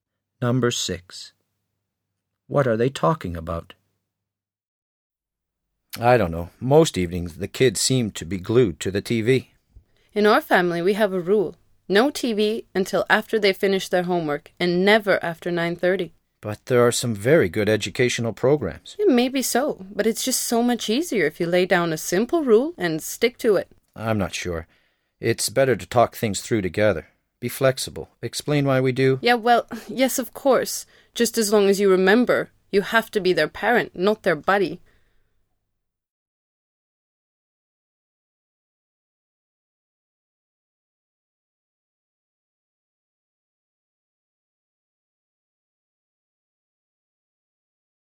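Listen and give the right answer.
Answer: Children watching TV / parenting rules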